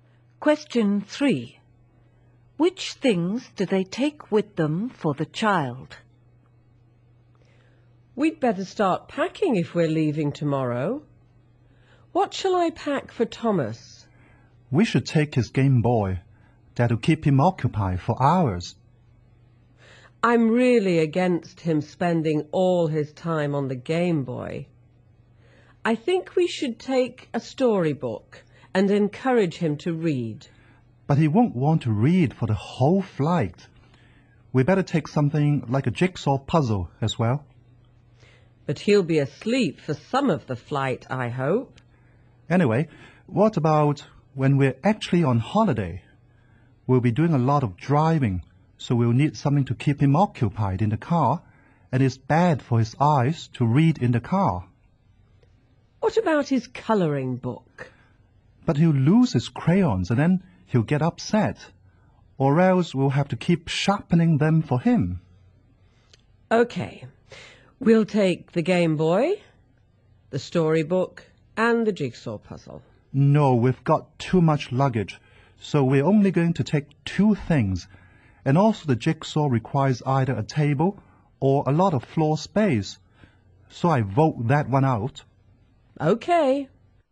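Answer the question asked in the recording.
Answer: The Game Boy and the storybook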